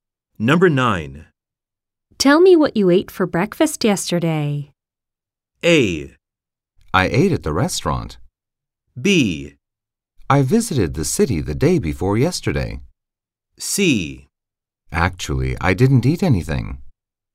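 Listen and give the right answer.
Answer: C: Actually, I didn't eat anything.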